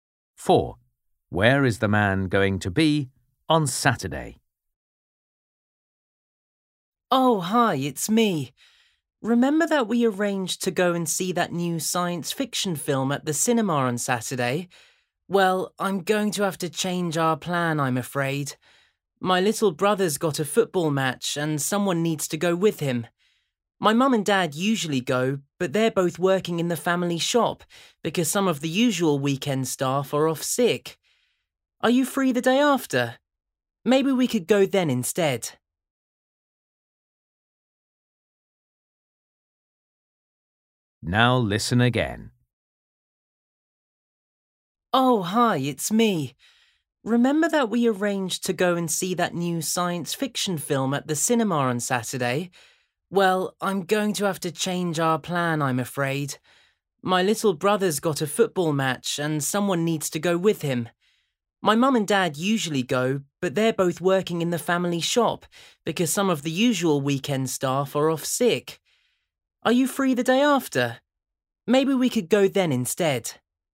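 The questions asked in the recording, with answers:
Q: Where is the man going to be on Saturday?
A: At his brother's football match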